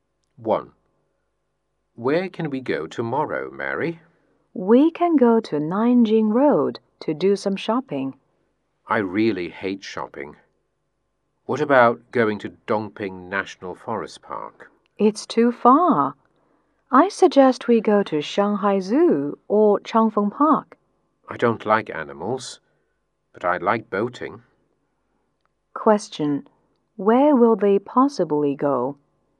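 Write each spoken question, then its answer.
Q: Where will they possibly go?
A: Changfeng Park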